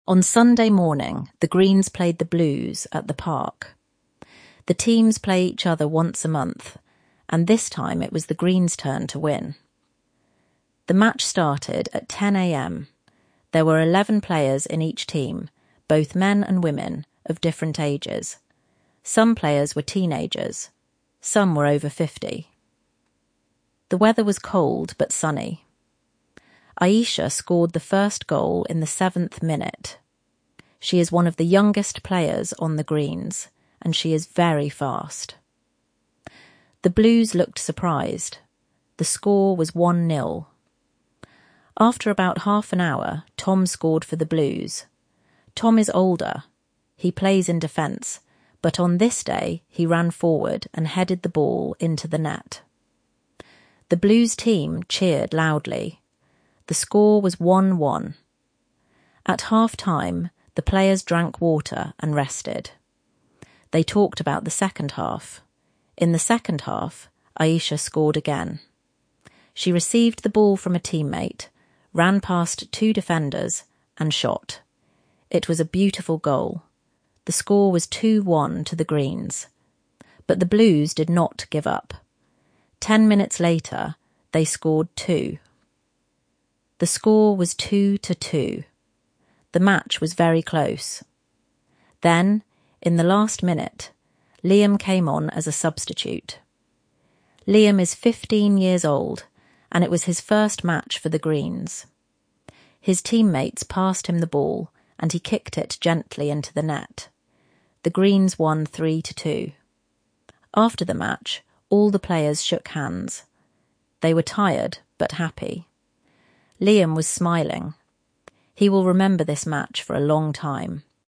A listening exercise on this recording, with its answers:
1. What was the weather like?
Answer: Cold but sunny.

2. Who scored the first goal, and when?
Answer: Aisha, in the 7th minute.

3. Who is Tom, and what was special about his goal?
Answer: Tom is an older player on the Blues, who plays in defence.

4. How did Aisha score her second goal?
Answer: She received the ball from a teammate

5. What was the score after the Blues' second goal?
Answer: 2–2.

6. Who scored the last goal, and what was special about it?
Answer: Liam

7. What did the players do after the match?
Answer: They shook hands.

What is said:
On Sunday morning, the Greens played the Blues at the park. The teams play each other once a month, and this time it was the Greens' turn to win.
The match started at 10 a.m. There were eleven players in each team — both men and women, of different ages. Some players were teenagers; some were over fifty. The weather was cold but sunny.
Aisha scored the first goal in the 7th minute. She is one of the youngest players on the Greens, and she is very fast. The Blues looked surprised. The score was 1–0.
After about half an hour, Tom scored for the Blues. Tom is older — he plays in defence — but on this day he ran forward and headed the ball into the net. The Blues' team cheered loudly.
At half-time, the players drank water and rested. They talked about the second half.
In the second half, Aisha scored again. She received the ball from a teammate, ran past two defenders, and shot. It was a beautiful goal. The score was 2–1 to the Greens.
But the Blues did not give up. Ten minutes later, they scored too. The match was very close.
Then, in the last minute, Liam came on as a substitute. Liam is fifteen years old, and it was his first match for the Greens. His teammates passed him the ball, and he kicked it gently into the net. The Greens won 3–2.
After the match, all the players shook hands. They were tired but happy. Liam was smiling — he will remember this match for a long time.